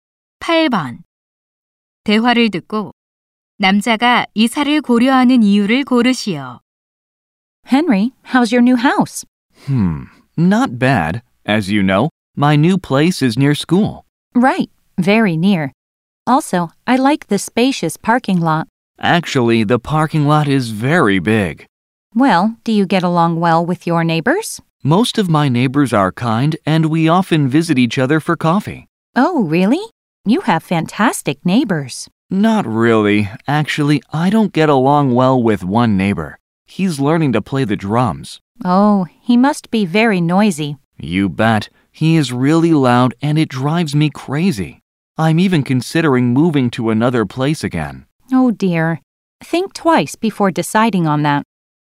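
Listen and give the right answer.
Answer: 이웃의 드럼 소음 때문에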